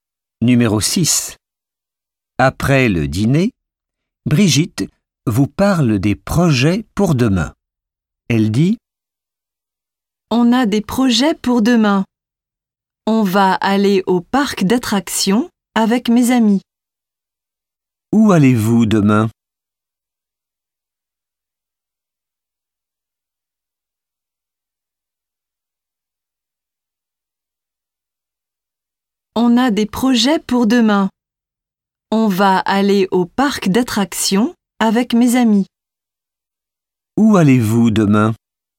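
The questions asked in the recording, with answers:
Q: Où allez-vous demain?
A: Au parc d'attractions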